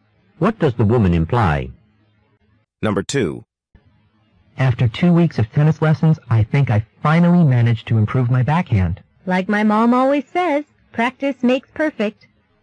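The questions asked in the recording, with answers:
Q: What does the woman mean?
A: His improvement came from practicing.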